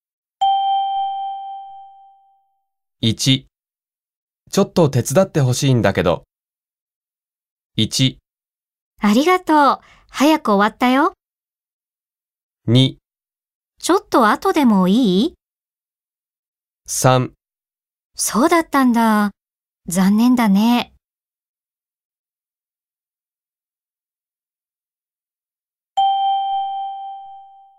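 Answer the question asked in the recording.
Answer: 2: ちょっと後でもいい?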